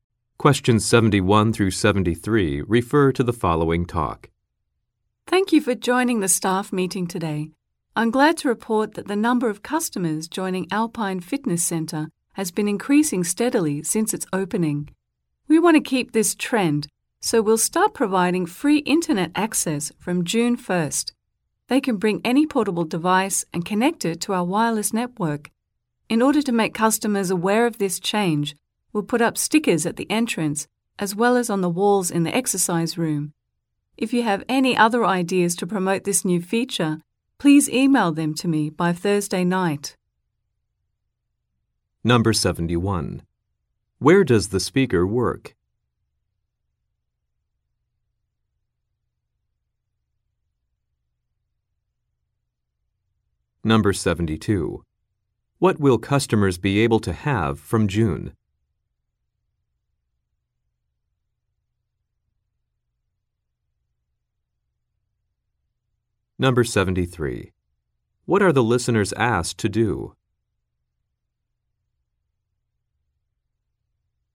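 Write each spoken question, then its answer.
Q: Where does the speaker work?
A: At a fitness center

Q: What will customers be able to have from June?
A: Free internet access

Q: What are the listeners asked to do?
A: Email ideas to promote the new feature by Thursday night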